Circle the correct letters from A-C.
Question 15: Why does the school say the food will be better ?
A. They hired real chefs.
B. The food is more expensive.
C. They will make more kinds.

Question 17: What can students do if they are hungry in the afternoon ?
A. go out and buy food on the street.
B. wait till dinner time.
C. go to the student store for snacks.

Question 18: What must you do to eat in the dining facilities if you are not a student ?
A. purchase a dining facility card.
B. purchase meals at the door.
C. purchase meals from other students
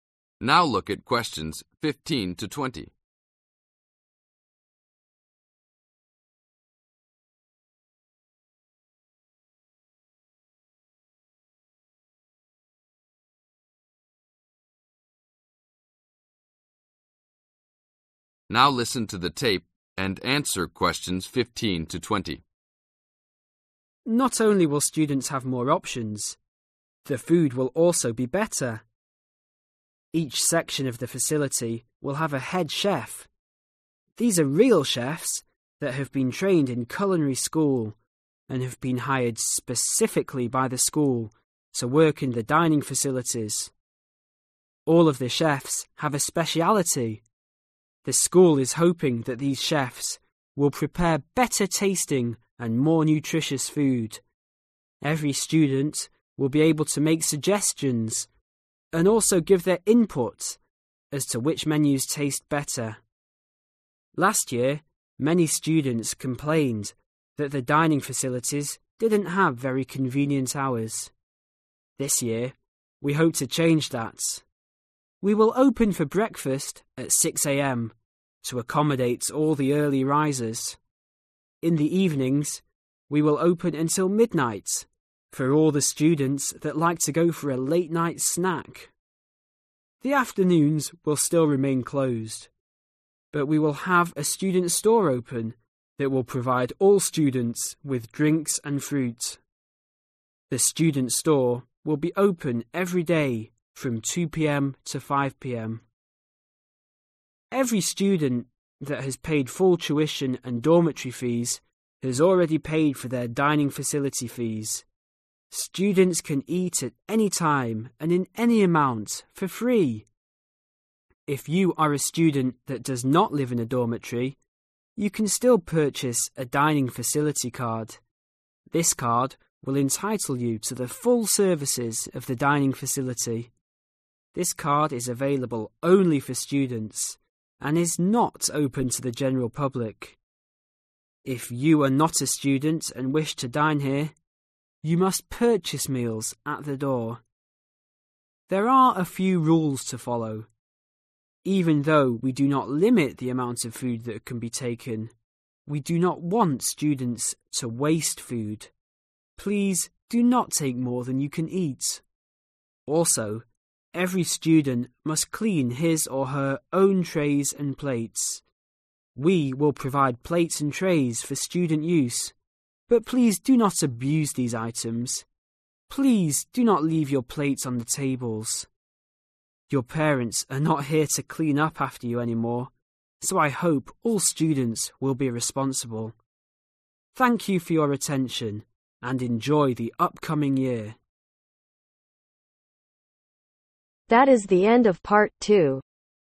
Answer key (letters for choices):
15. A
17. C
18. B